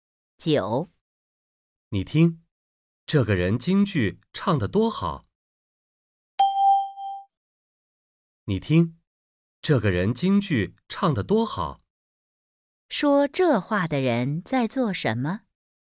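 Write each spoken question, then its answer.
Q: 说这话的人在做什么?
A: 在听京剧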